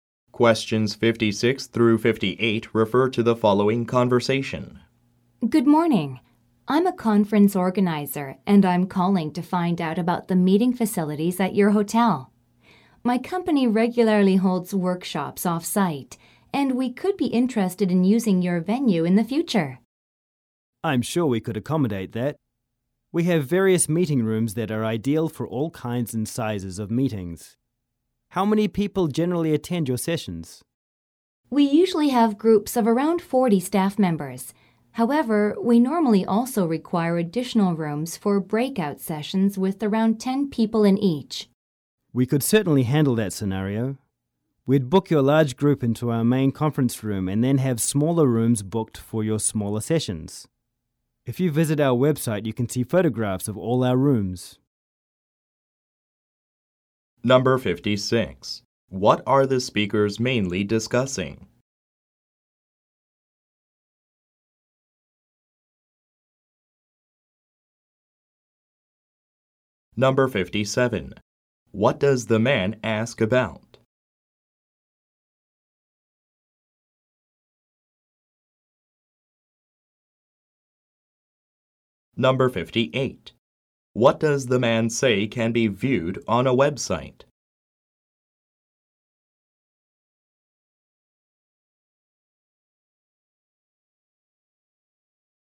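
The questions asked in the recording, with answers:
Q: What are the speakers mainly discussing?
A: Hotel meeting facilities for workshops

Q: What does the man say can be viewed on a website?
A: Photographs of the rooms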